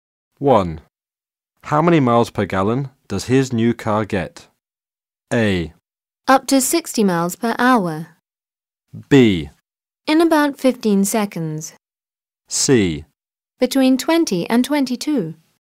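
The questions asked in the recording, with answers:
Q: How many miles per gallon does his new car get?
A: C: Between 20 and 22.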